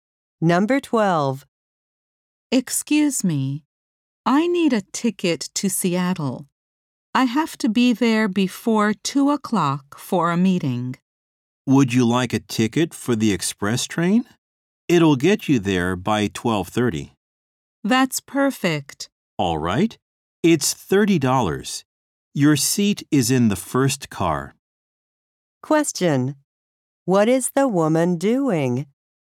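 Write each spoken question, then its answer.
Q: What is the woman doing?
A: Buying a train ticket to Seattle.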